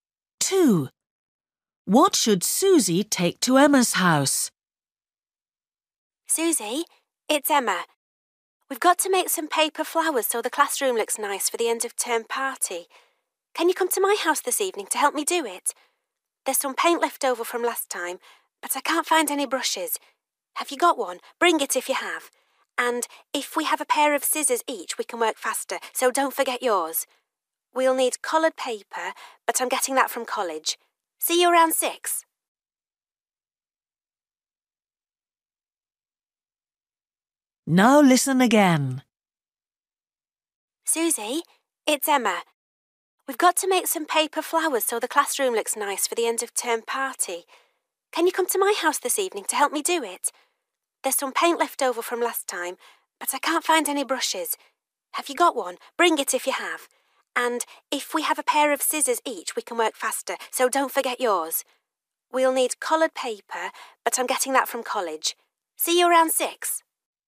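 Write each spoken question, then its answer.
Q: What should Susie take to Emma's house?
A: a brush and scissors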